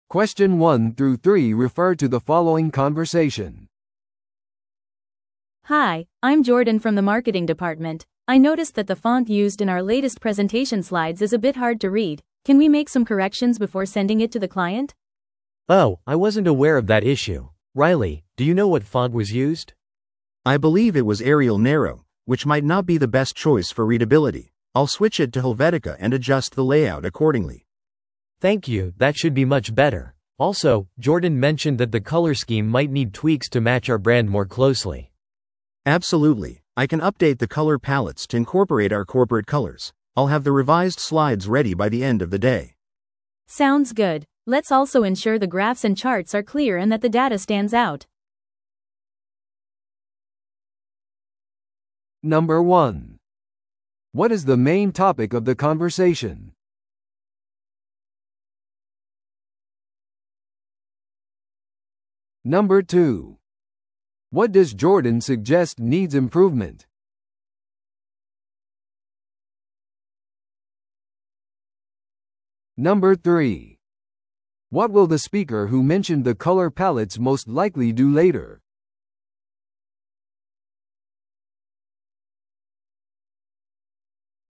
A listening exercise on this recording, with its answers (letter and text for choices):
Listen to the audio below and answer the questions.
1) What is the main topic of the conversation?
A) 新しいマーケティング戦略の選択。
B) マーケティング資料の予算レビュー。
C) プレゼンテーション資料のデザイン修正の依頼。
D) マーケティング部門のカンファレンスの整備。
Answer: C) プレゼンテーション資料のデザイン修正の依頼。

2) What does Jordan suggest needs improvement?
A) クライアントへのプレゼンテーションの場所。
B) スライドのフォントと配色。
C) プレゼンテーションの配信日。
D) 使用されるグラフとチャートの選択。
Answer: B) スライドのフォントと配色。

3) What will the speaker who mentioned the color palettes most likely do later?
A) クライアントとブランディングについて話し合う。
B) 将来のプレゼンテーション用の新しいテンプレートを作成する。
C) 更新された色で修正されたスライドを準備する。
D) オフィスのマーケティング資料を整理する。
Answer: C) 更新された色で修正されたスライドを準備する。

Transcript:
A: Hi, I'm Jordan from the marketing department. I noticed that the font used in our latest presentation slides is a bit hard to read. Can we make some corrections before sending it to the client?
B: Oh, I wasn't aware of that issue. Riley, do you know what font was used?
C: I believe it was Arial Narrow, which might not be the best choice for readability. I'll switch it to Helvetica and adjust the layout accordingly.
B: Thank you, that should be much better. Also, Jordan mentioned that the color scheme might need tweaks to match our brand more closely.
C: Absolutely, I can update the color palettes to incorporate our corporate colors. I'll have the revised slides ready by the end of the day.
A: Sounds good. Let's also ensure the graphs and charts are clear and that the data stands out.